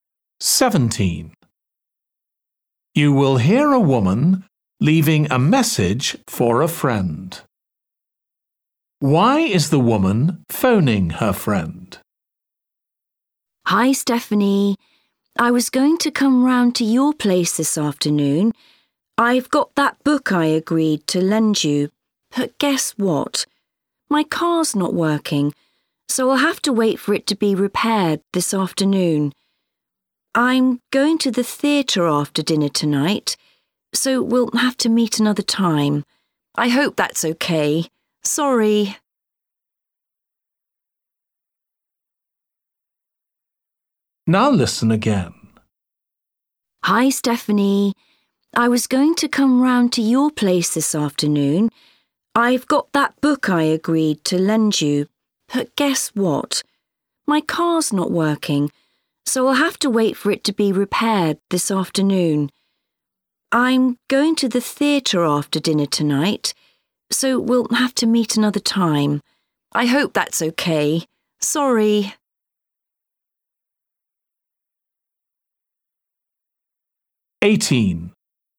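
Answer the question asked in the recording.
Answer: to cancel meeting this afternoon because her car isn't working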